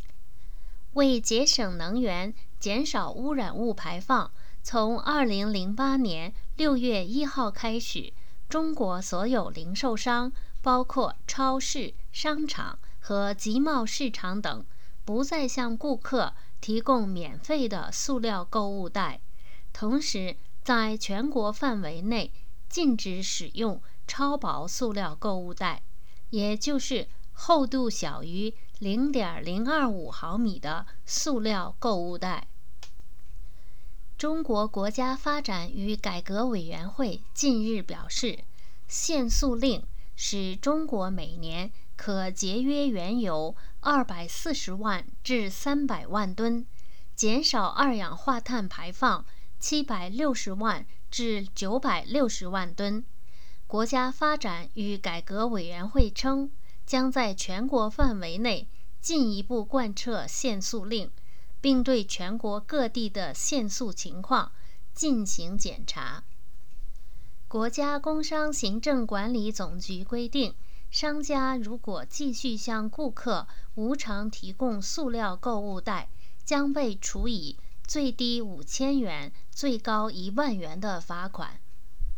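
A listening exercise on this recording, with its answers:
Please answer the following questions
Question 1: 中国是从何时开始不再向顾客提供免费塑料购物袋的?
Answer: 从2008年6月1号开始

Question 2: 中国禁止使用什么样的塑料购物袋?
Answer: 超薄塑料购物袋,即厚度小于0.025毫米的塑料购物袋

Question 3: "限塑"令使中国每年减少排放多少二氧化碳?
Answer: 760万至960万吨

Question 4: 如果商家向顾客无偿提供塑料购物袋,会被处以多少罚款?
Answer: 最低5000元、最高10000元

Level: M.Phil Year 2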